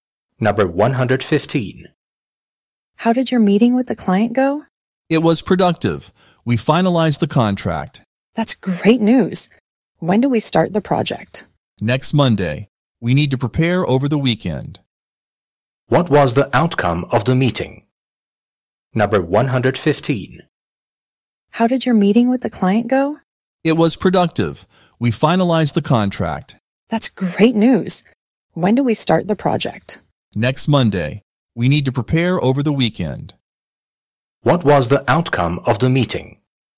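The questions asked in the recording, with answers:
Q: What was the outcome of the meeting?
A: They finalized the contract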